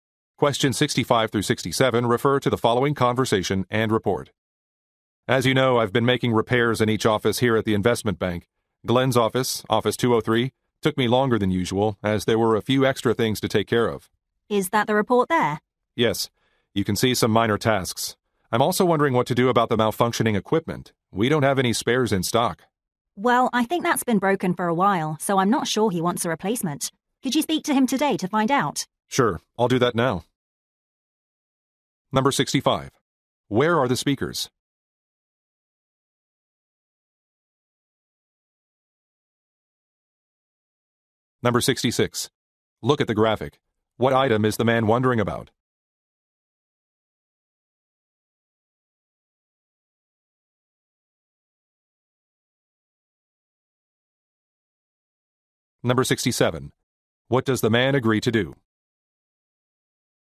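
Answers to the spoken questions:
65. At an investment bank
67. Speak to Glenn today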